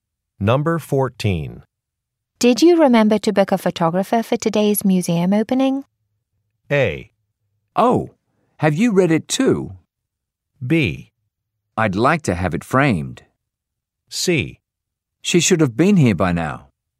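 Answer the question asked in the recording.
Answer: C: She should have been here by now.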